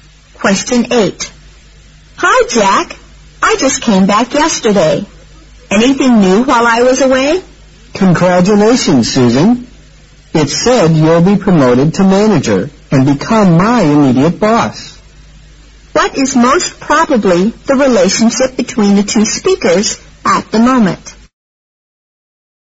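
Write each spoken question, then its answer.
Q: What is most probably the relationship between the two speakers at the moment?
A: Colleagues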